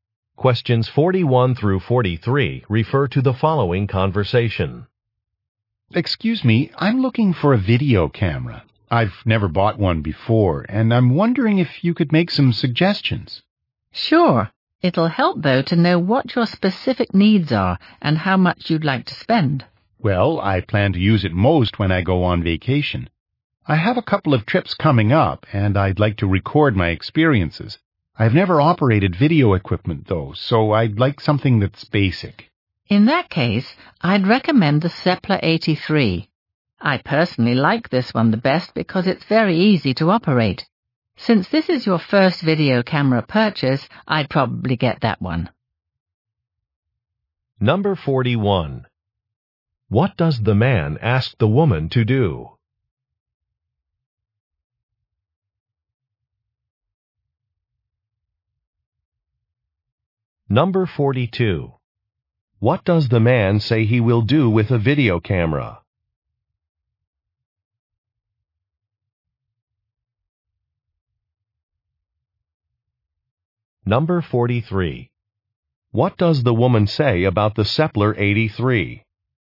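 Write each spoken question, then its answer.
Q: What does the man ask the woman to do?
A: Make some suggestions (recommend a video camera)

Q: What does the man say he will do with a video camera?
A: Record his vacation trips

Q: What does the woman say about the Seppler 83?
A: It is very easy to operate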